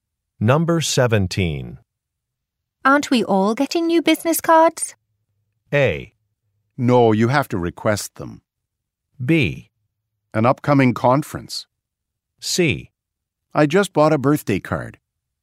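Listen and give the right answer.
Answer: A: No, you have to request them.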